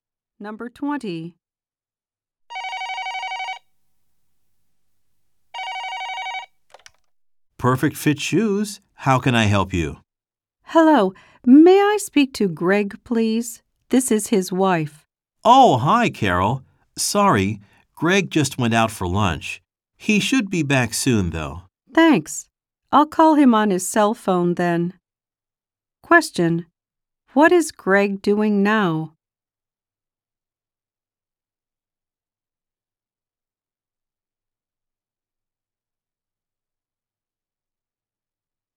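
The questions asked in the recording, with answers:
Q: What is Greg doing now?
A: Having lunch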